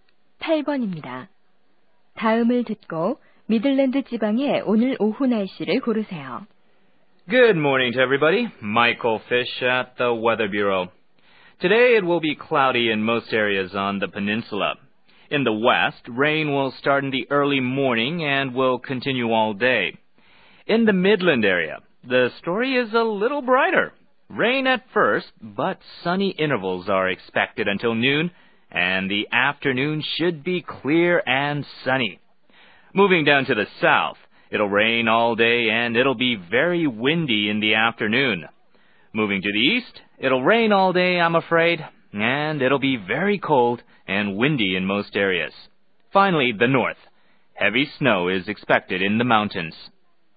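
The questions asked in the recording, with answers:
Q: 다음을 듣고 미들랜드 지방의 오늘 오후 날씨를 고르세요.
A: 맑고 화창함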